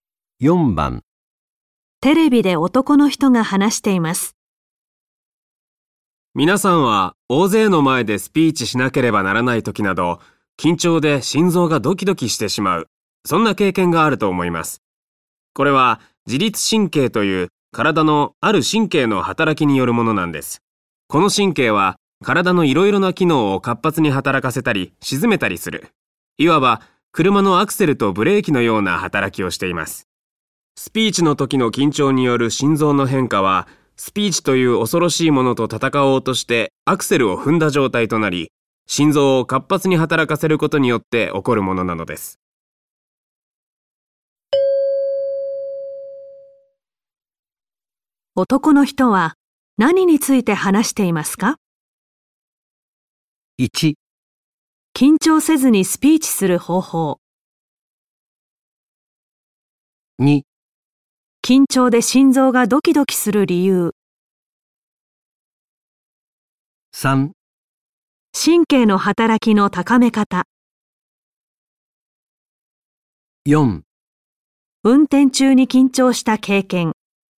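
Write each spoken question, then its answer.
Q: 男の人は何について話していますか?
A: 2: 緊張で心臓がドキドキする理由。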